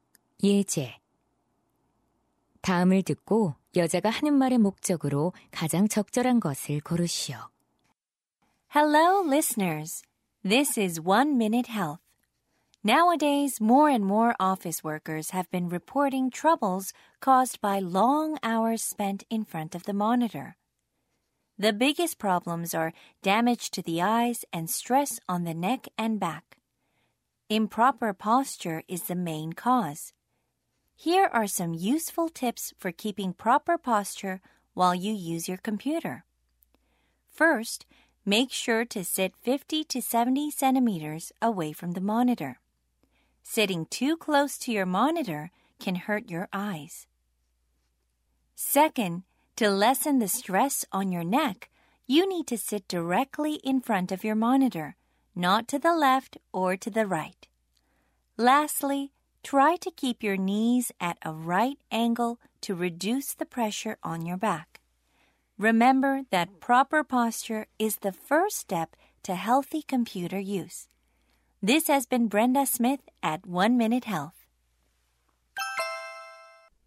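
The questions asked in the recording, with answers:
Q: 다음을 듣고 여자가 하는 말의 목적으로 가장 적절한 것을 고르시오.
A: 컴퓨터 사용 시 올바른 자세를 유지하는 방법을 안내하려고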